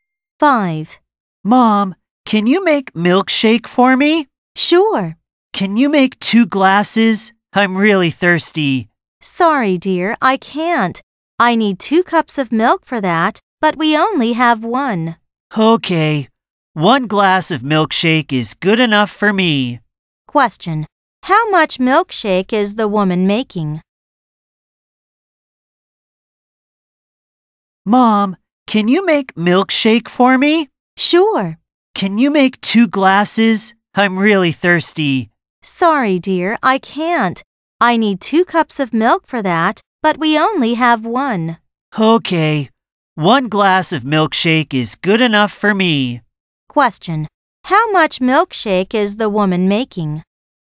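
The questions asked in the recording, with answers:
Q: How much milkshake is the woman making?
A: One glass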